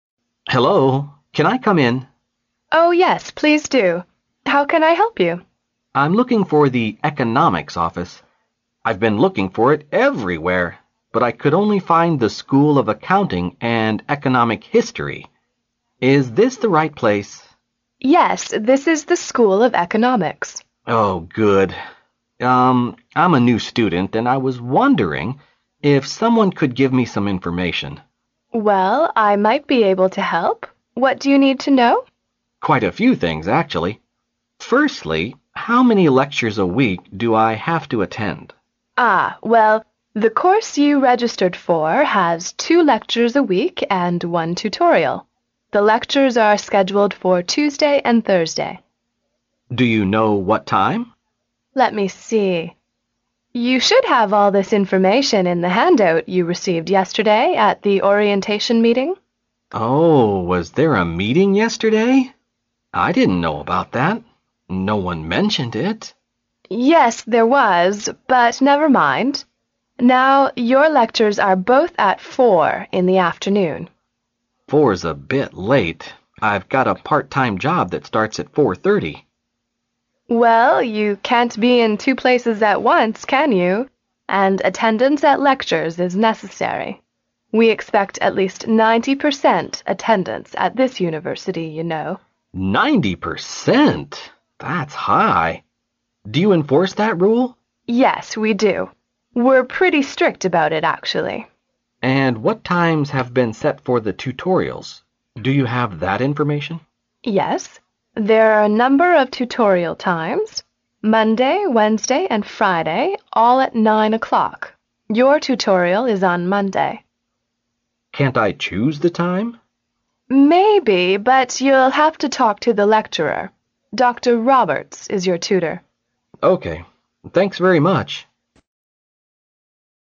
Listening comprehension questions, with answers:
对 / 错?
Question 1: The student is looking for the Economic history office.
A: 错

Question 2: The two lectures the man registered for are on Tuesday and Wednesday.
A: 错

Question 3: The orientation meeting was held yesterday.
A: 对

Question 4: The rule of attendance at lectures is necessary.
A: 对

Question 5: Students have to attend tutorials once every other week.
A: 错

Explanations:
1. 录音中的学生提到"I'm looking for the Economics Office.",可见学生找的是Economics Office,而不是Economic history office。因此,该判断错误。
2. 题目中涉及到两门课的上课时间,录音中与此相关的内容是"The lectures are scheduled for Tuesday and Thursday."可见,两门讲座的开讲时间是周二和周四,而不是周二和周三。因此,该判断错误。
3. 录音中学生问到"Oh, was there a meeting yesterday?"女士回答道"Yes, there was."由此可见,昨天学院里开设了新生报到会。因此,该判断正确。
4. 细节题。录音中的女士讲到"And attendance at lectures is necessary."因此,该判断正确。
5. 题目中的"once every other week"是"每隔一周一次"的意思,而录音中与此相关的内容是"Yes, there are a number of tutorial times: Monday, Wednesday and Friday all at 9 o'clock. Your tutorial is on Monday."由此可以推断,导师辅导也是每周一次,而不是每隔一周一次。因此,该判断错误。

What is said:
[听力原文] M: Hello. Can I come in? W: Oh, yes, please do. How can I help you? M: I'm looking for the Economics Office. I've been looking for it everywhere. But I could only find the School of Accounting and Economic History. Is this the right place? W: Yes. This is the School of Economics. M: Oh, good. I am a new student. And I was wondering if someone could give me some information. W: Well, I might be able to help. What do you need to know? M: Quite a few things, actually. Firstly, how many lectures a week do I have to attend? W: Ah, well, the course you registered for has two lectures a week and one tutorial. The lectures are scheduled for Tuesday and Thursday. M: Do you know what time? W: Let me see. You should have all this information in the handout you received yesterday at the orientation meeting. M: Oh, was there a meeting yesterday? I didn't know about that. No one mentioned it. W: Yes, there was. But never mind. Now your lectures are both at four in the afternoon. M: Four is a bit late. I've got a part-time job that starts at 4:30. W: Well, you can't be in two places at once, can you? And attendance at lectures is necessary. We expect at least 90 percent attendance at this university, you know. That's high. Do you enforce that rule? W: Yes, we do. We are pretty strict about it, actually. M: And what times have been set for the tutorials? Do you have that information? W: Yes, there are a number of tutorial times: Monday, Wednesday and Friday all at 9 o'clock. Your tutorial is on Monday. M: Can't I choose the time? W: Maybe, but you'll have to talk to the lecturer. Doctor Roberts is your tutor. M: OK, thanks very much.